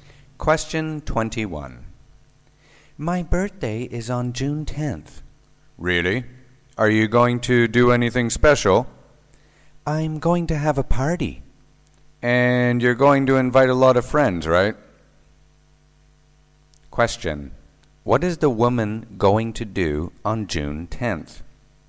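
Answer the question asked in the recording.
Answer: Have a birthday party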